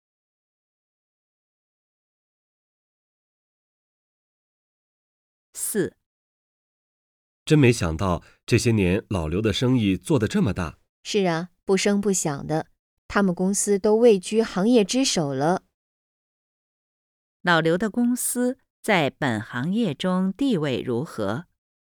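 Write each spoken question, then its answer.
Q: 老刘的公司在本行业中地位如何?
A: 位居行业之首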